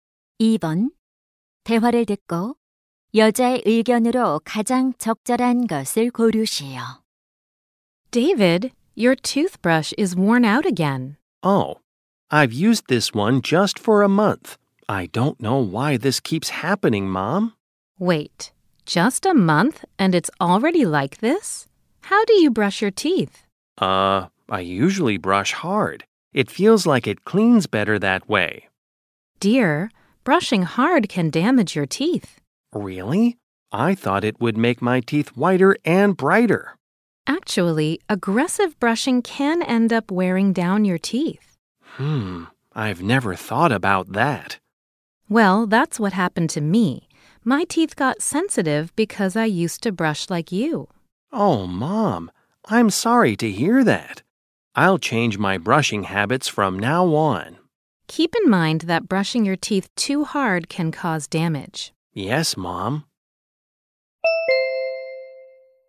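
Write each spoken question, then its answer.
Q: 대화를 듣고 여자의 의견으로 가장 적절한 것을 고르시오.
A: 이를 너무 세게 닦으면 치아가 손상될 수 있다.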